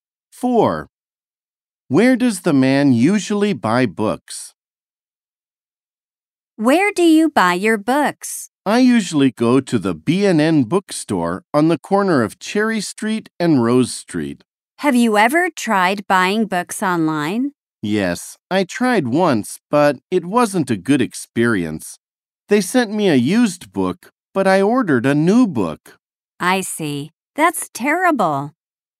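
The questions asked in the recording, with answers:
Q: Where does the man usually buy books?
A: At the B&N bookstore on the corner of Cherry Street and Rose Street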